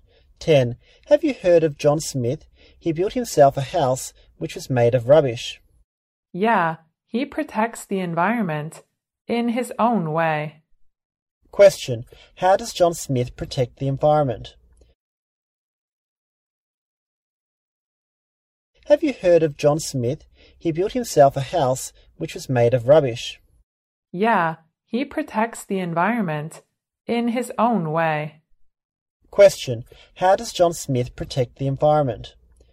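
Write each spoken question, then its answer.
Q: How does John Smith protect the environment?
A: He built a house made of rubbish.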